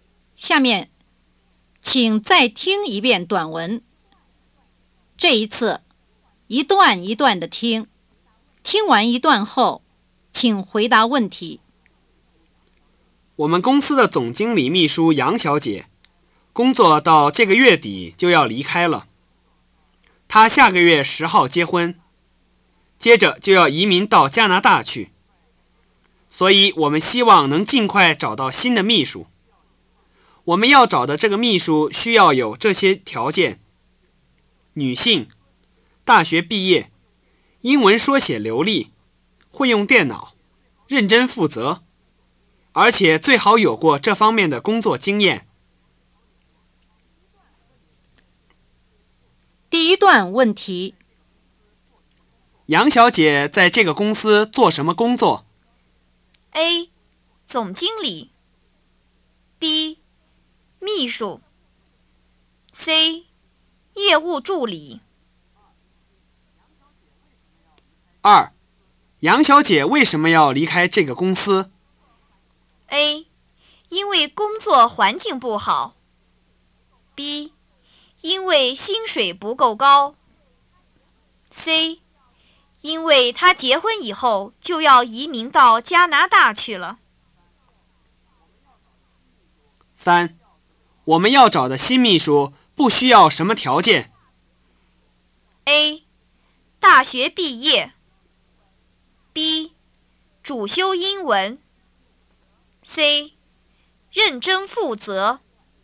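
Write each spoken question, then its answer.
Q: 杨小姐在这个公司做什么工作?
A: B: 秘书

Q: 杨小姐为什么要离开这个公司?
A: C: 因为她结婚以后就要移民到加拿大去了。

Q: 我们要找的新秘书不需要什么条件?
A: B: 主修英文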